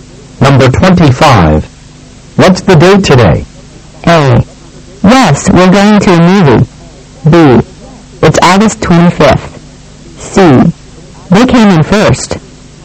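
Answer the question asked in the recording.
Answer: B: It's August 25th.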